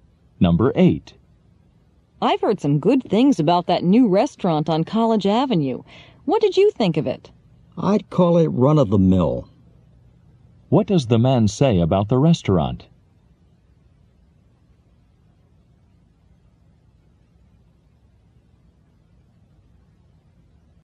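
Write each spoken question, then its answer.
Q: What does the man say about the restaurant?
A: It's ordinary, nothing special.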